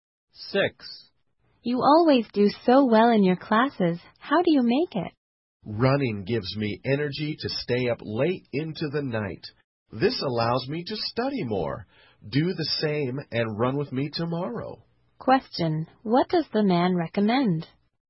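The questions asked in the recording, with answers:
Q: What does the man recommend?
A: Running with him to get energy to study more.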